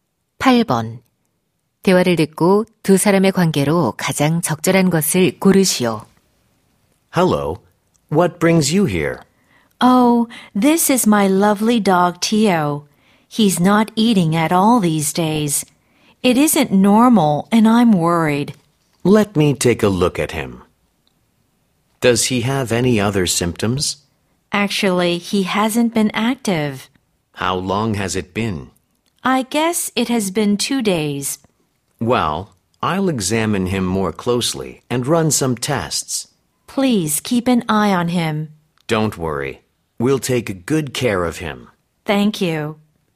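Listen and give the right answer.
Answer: 수의사 - 반려견 주인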